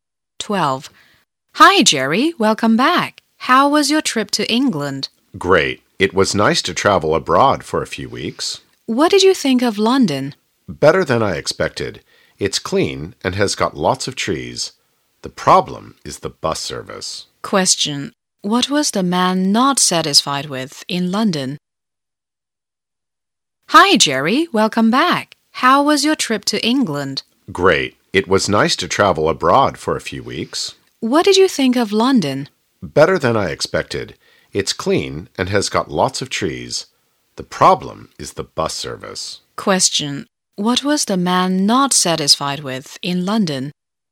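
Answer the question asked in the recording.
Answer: The bus service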